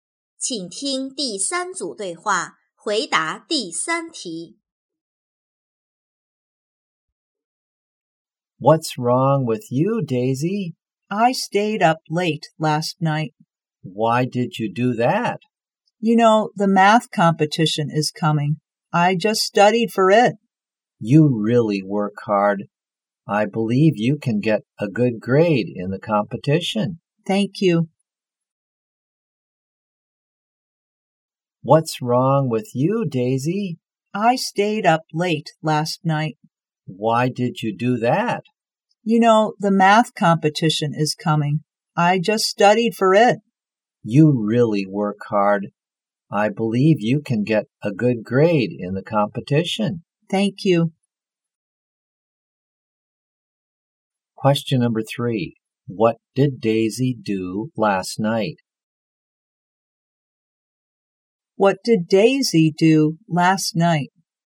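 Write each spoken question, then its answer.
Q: What did Daisy do last night?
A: She stayed up late studying for the math competition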